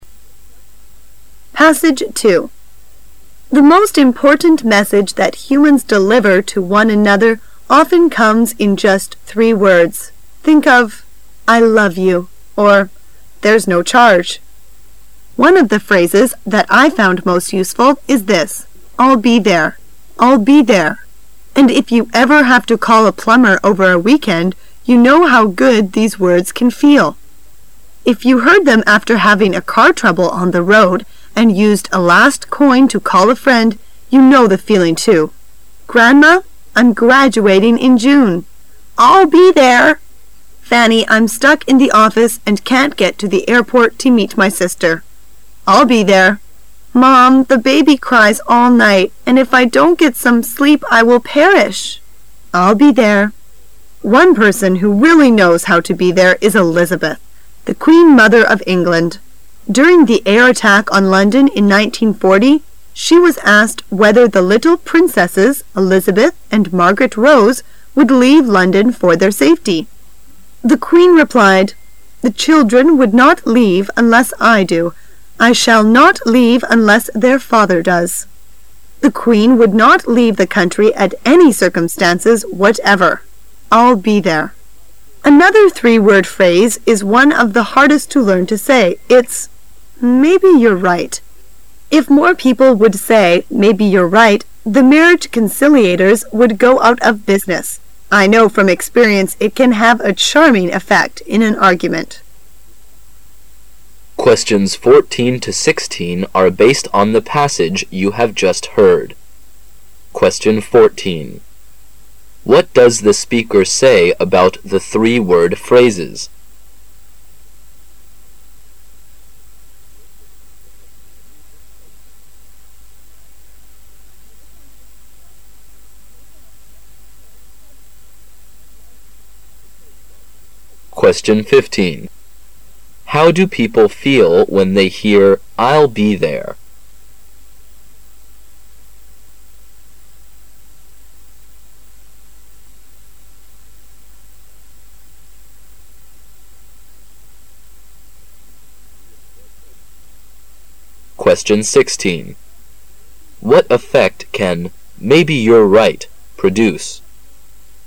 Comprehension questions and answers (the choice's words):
How do people feel when they hear"I'll be there"?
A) Dismayed.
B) Relieved.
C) Disappointed.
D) Frustrated.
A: Relieved.

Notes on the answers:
推理题。题干问当人们听到I'll be there时心中是怎么样的感觉。说话者列举了人们听到这个短语的多个场景,总结起来,你有困难向人求助时,对方说这样的话表示他们会赶来帮忙,所以听者的感觉应该是[B] Relieved"放心的"。

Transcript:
[解析] 14-16 The most important message that humans deliver to one another often comes in just three words. Think of "I love you" or "There's no charge". One of the phrases that I found most useful is this, "I'll be there". "I'll be there", and if you ever have to call a plumber over a weekend you know how good these words can feel. If you heard them after having a car trouble on the road and used a last coin to call a friend, you know the feeling too. "Grandma, I'm graduating in June." "I'll be there." "Fanny, I'm stuck in the office and can't get to the airport to meet my sister." "I'll be there." "Mum, the baby cries all night, and if I don't get some sleep I will perish." "I'll be there." One person who really knows how to be there is Elizabeth, the queen mother of England. During the air attack on London in 1940, she was asked whether the little princesses Elizabeth and Margaret Rose would leave London for their safety. The Queen replied "The children would not leave unless I do. I shall not leave unless their father does." The Queen would not leave the country at any circumstances whatever. "I'll be there." Another three-word phrase is one of the hardest to learn to say. It's "Maybe you're right". If more people would say "Maybe you're right" the marriage conciliators would go out of business. I know from experience it can have a charming effect in an argument. 14.What does the speaker say about.the three-word phrases?